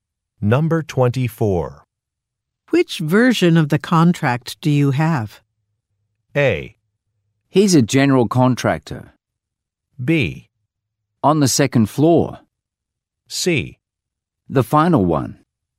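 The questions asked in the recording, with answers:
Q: Which version of the contract do you have?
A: C: The final one.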